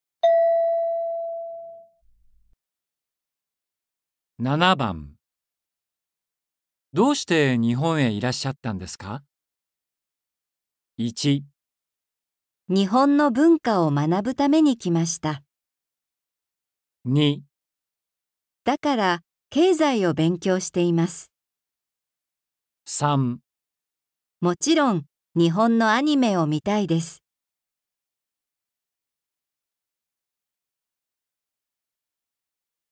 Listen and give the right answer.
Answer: 1

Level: N4.42